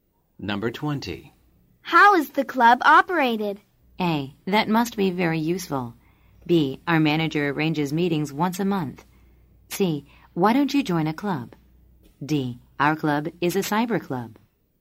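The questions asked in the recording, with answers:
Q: How is the club operated?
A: B: Our manager arranges meetings once a month.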